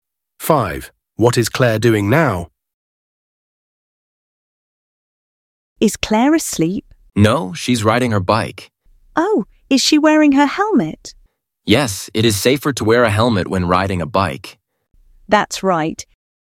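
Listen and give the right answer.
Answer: Riding her bike, wearing a helmet.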